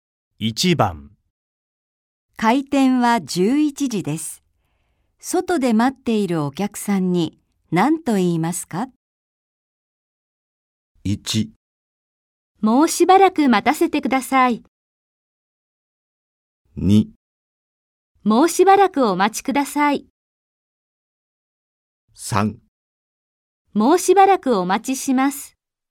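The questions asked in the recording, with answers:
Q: 開店は11時です。外で待っているお客さんに何と言いますか?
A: 2: もうしばらくお待ちください。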